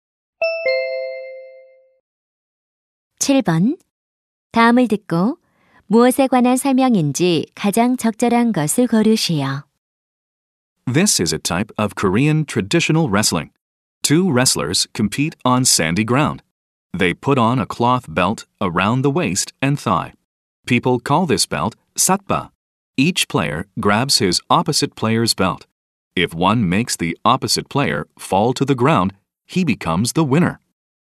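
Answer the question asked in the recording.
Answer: 씨름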